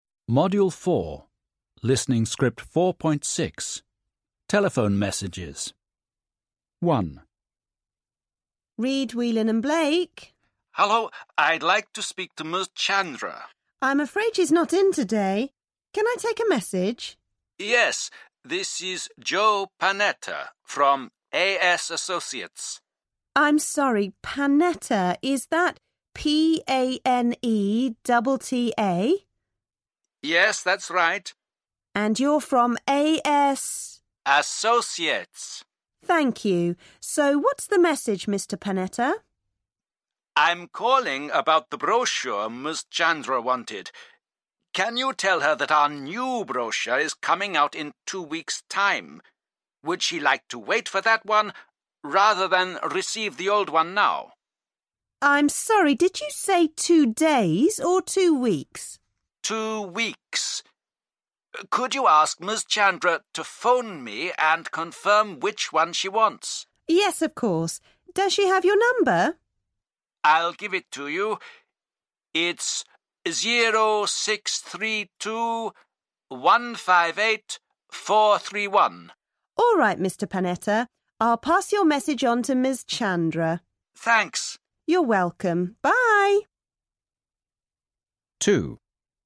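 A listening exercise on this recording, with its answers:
Listen and answer the following questions:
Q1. What's the supplier's name?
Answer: Joe Panetta

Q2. What's the supplier's company's name?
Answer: AS Associates

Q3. What message does the supplier want to leave?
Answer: The new brochure is coming out in 2 weeks; Ms Chandra should phone to confirm which one she wants

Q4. What's the supplier's phone number?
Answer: 0632-158-431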